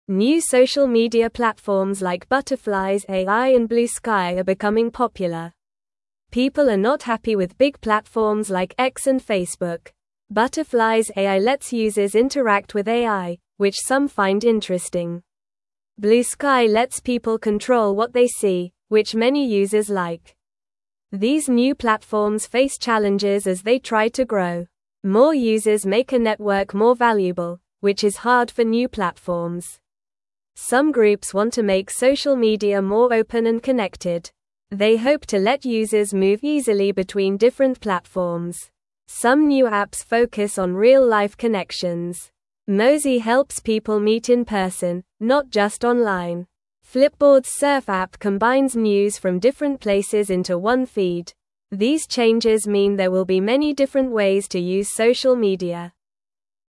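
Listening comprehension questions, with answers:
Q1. New social ? platforms like Butterflies AI and Bluesky are becoming popular.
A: media

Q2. People are not ? with big platforms like X and Facebook.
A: happy

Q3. ? lets people control what they see, which many users like.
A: Bluesky

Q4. These new platforms face ? as they try to grow.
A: challenges

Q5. They hope to let users ? easily between different platforms.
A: move

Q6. Mozi helps people meet in person, not just ?.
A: online

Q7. Flipboard's Surf app combines news from different ? into one feed.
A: places

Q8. These ? mean there will be many different ways to use social media.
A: changes

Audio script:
New social media platforms like Butterflies AI and Bluesky are becoming popular. People are not happy with big platforms like X and Facebook. Butterflies AI lets users interact with AI, which some find interesting. Bluesky lets people control what they see, which many users like.
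These new platforms face challenges as they try to grow. More users make a network more valuable, which is hard for new platforms. Some groups want to make social media more open and connected. They hope to let users move easily between different platforms.
Some new apps focus on real-life connections. Mozi helps people meet in person, not just online. Flipboard's Surf app combines news from different places into one feed. These changes mean there will be many different ways to use social media.

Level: Level 2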